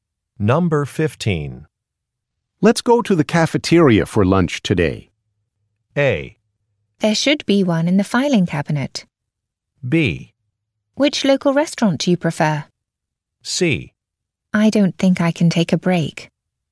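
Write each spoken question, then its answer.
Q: Let's go to the cafeteria for lunch today.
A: C: I don't think I can take a break.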